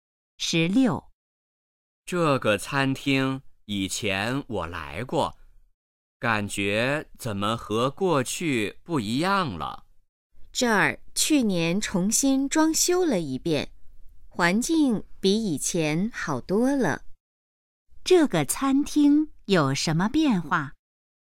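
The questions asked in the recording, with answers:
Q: 这个餐厅有什么变化?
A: 重新装修了,环境比以前好多了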